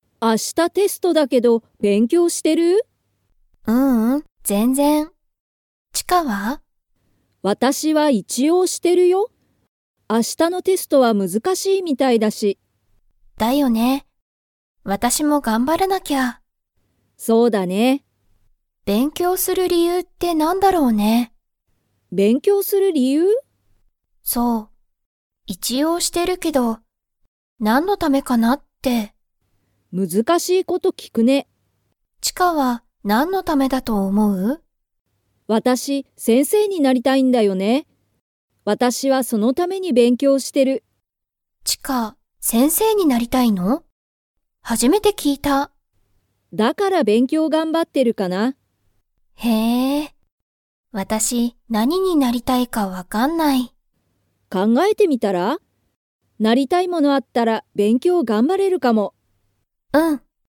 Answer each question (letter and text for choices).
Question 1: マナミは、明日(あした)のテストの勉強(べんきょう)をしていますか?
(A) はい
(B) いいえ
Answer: (B) いいえ

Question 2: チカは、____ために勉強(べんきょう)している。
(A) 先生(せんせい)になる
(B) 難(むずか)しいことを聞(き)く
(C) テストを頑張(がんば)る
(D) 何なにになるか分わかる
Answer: (A) 先生(せんせい)になる

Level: Level 2